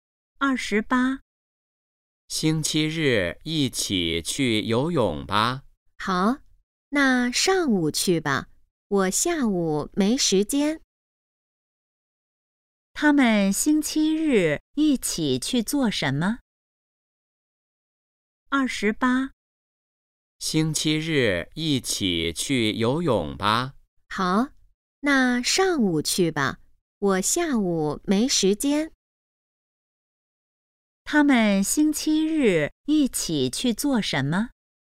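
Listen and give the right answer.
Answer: 游泳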